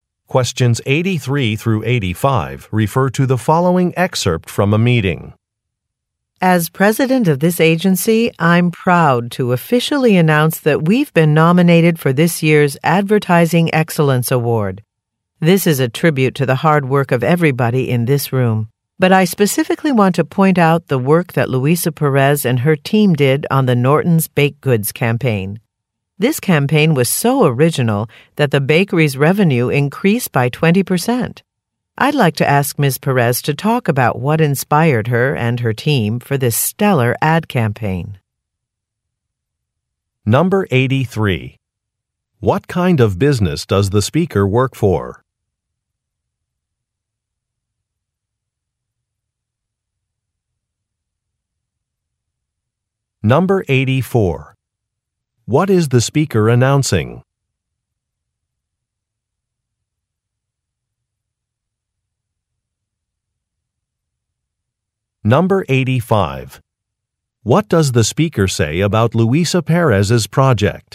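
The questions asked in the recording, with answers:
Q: What kind of business does the speaker work for?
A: An advertising agency

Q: What is the speaker announcing?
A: The agency has been nominated for the Advertising Excellence Award

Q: What does the speaker say about Luisa Perez's project?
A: It was very original and increased the bakery's revenue by 20%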